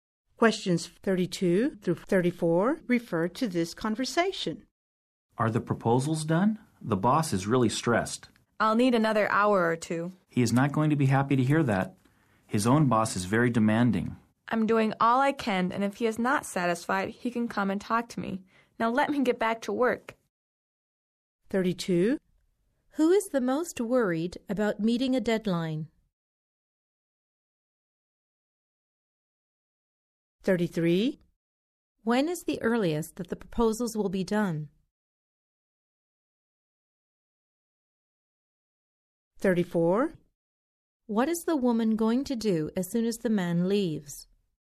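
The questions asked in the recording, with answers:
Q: When is the earliest that the proposals will be done?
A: In an hour or two

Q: What is the woman going to do as soon as the man leaves?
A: Get back to work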